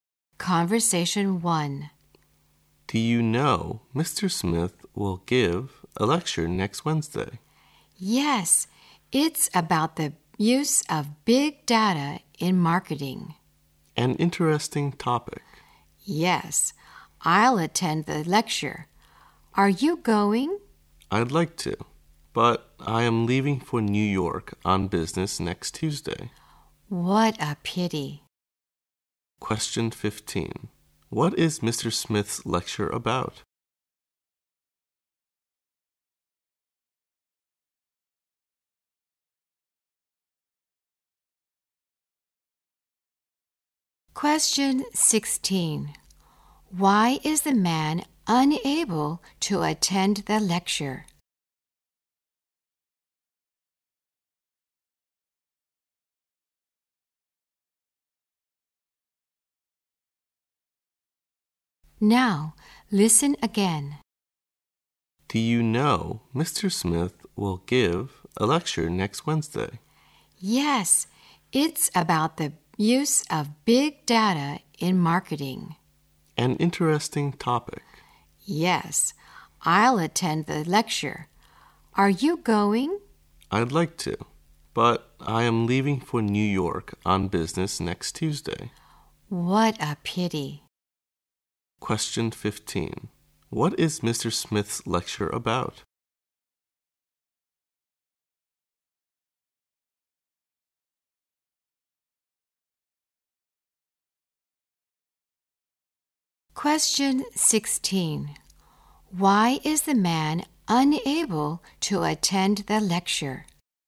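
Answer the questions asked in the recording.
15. The use of big data in marketing
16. He is leaving for New York on business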